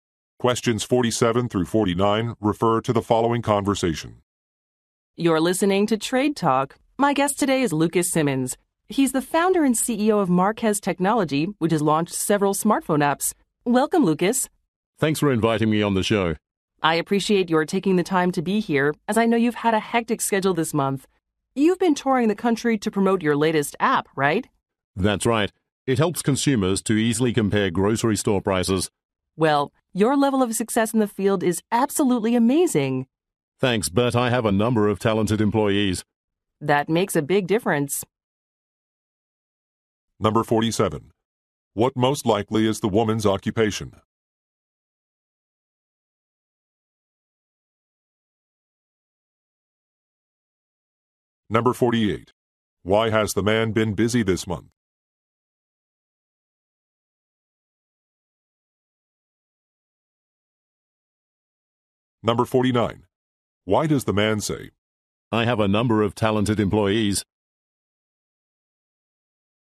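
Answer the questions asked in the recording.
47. Show host
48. He has been touring the country to promote his new app
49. To give his employees credit for the success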